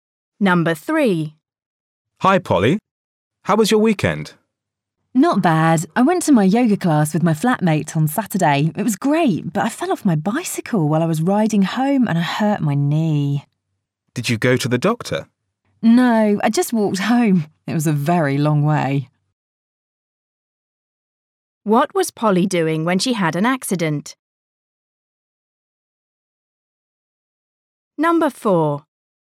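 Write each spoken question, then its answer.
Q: What was Polly doing when she had an accident?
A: Riding her bicycle home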